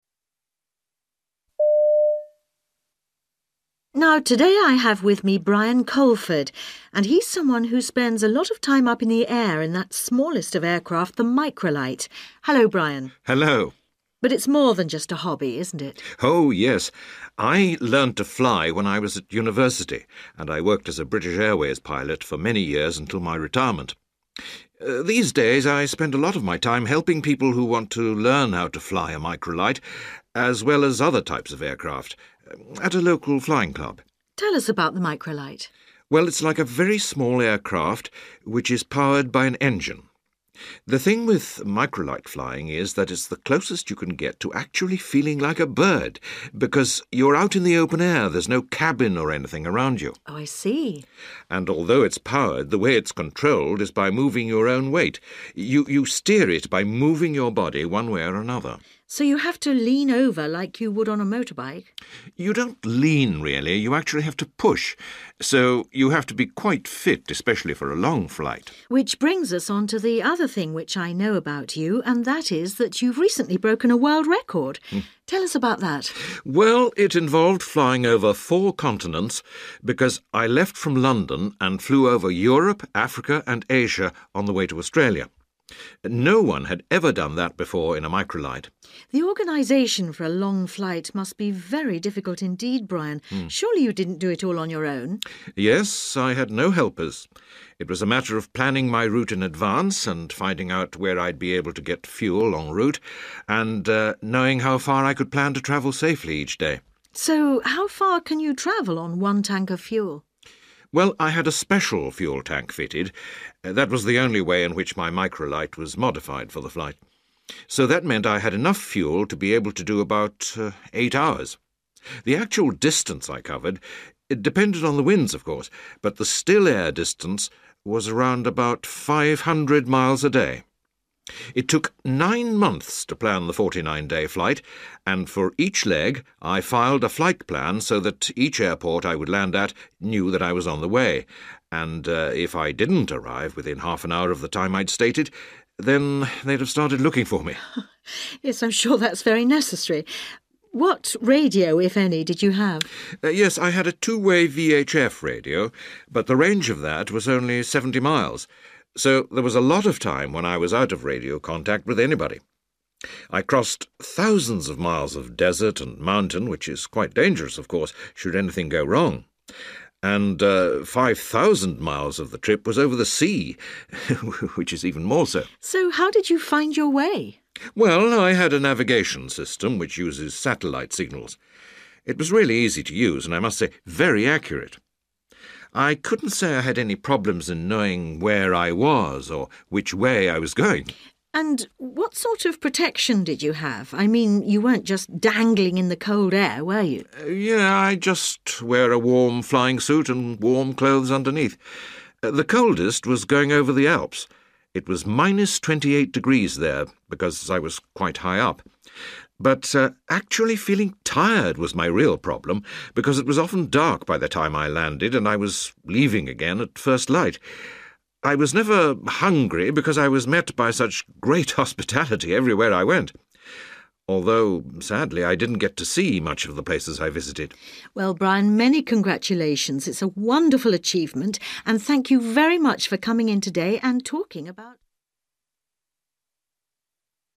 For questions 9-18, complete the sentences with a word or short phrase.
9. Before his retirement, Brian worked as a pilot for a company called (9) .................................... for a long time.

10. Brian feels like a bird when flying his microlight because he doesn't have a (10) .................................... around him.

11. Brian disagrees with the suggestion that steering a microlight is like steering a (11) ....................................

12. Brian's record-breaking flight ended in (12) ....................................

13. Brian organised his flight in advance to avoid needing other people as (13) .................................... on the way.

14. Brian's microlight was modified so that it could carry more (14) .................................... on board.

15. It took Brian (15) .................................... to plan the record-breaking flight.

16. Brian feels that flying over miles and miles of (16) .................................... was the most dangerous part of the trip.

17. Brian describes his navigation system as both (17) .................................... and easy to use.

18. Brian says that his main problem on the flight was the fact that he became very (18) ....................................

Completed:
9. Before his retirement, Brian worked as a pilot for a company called British Airways / B.A. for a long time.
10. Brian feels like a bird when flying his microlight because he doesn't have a cabin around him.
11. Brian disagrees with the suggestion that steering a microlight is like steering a motorbike
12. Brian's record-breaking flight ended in Australia
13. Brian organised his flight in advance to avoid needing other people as helpers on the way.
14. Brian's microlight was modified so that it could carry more fuel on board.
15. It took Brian 9 months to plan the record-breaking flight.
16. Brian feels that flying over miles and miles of sea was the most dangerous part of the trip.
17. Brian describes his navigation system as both accurate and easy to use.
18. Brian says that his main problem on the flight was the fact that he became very tired

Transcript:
Interviewer: Now, today I have with me Brian Coleford and he's someone who spends a lot of time up in the air in that smallest of aircraft, the microlight.
Interviewer: But it's more than just a hobby, isn't it?
Brian: Oh yes, I learned to fly when I was at university and I worked as a British Airways pilot for many years until my retirement. These days I spend a lot of my time helping people who want to learn how to fly a microlight, as well as other types of aircraft, at a local flying club.
Interviewer: Tell us about the microlight.
Brian: Well, it's like a very small aircraft, which is powered by an engine. The thing with microlight flying is that it's the closest you can get to actually feeling like a bird because you're out in the open air, there's no cabin or anything around you.
Interviewer: Oh I see ...
Brian: And although it's powered, the way it's controlled is by moving your own weight, you steer it by moving your body one way or another.
Interviewer: So you have to lean over like you would on a motorbike?
Brian: You don't lean really, you actually have to push. So you have to be quite fit especially for a long flight.
Interviewer: Which brings us on to the other thing which I know about you and that is that you've recently broken a world record.
Brian: Well, it involved flying over four continents because I left from London and flew over Europe, Africa and Asia on the way to Australia. No one had ever done that before in a microlight.
Interviewer: The organisation for a long flight must be very difficult indeed, Brian. Surely you didn't do it all on you own?
Brian: Yes, I had no helpers. It was a matter of planning my route in advance and finding out where I'd be able to get fuel en route and knowing how far I could plan to travel safely each day.
Interviewer: So how far can you travel on one tank of fuel?
Brian: Well, I had a special fuel tank fitted – that was the only way in which my microlight was modified for the flight. So that meant I had enough fuel to be able to do about eight hours. The actual distance I covered depended on the winds, of course, but the still-air distance was round about 500 miles a day. It took nine months to plan the 49-day flight, and for each leg I filed a flight plan so that each airport I would land at knew that I was on the way, and if I didn't arrive within half an hour of the time I'd stated, then they'd have started looking for me.
Interviewer: Yes I'm sure that's very necessary. What radio, if any, did you have?
Brian: Yes; I had a two-way VHF radio, but the range of that was only 70 miles, so there was a lot of time when I was out of radio contact with anybody. I crossed thousands of miles of desert and mountain which is quite dangerous, of course, should anything go wrong, and 5,000 miles of the trip was over the sea, which is even more so.
Interviewer: So how did you find your way?
Brian: Well, I had a navigation system which uses satellite signals. It was really easy to use and, I must say, very accurate. I couldn't say I had any problems in knowing where I was or which way I was going.
Interviewer: And what sort of protection did you have? I mean, you weren't just dangling in the cold air, were you?
Brian: Yeah, I just wear a warm flying suit and warm clothes underneath. The coldest was going over the Alps, it was minus 28 degrees there, because I was quite high up. But actually feeling tired was my real problem because it was often dark by the time I landed and I was leaving again at first light. I was never hungry because I was met by such great hospitality everywhere I went. Although sadly I didn't get to see much of the places I visited.
Interviewer: Well, Brian, many congratulations. It's a wonderful achievement and thank you very much for coming in today and talking about ...

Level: B2